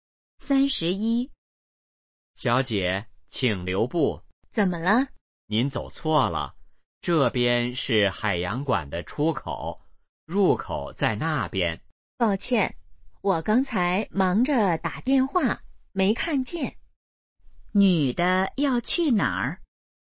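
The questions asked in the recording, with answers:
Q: 女的要去哪儿?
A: 海洋馆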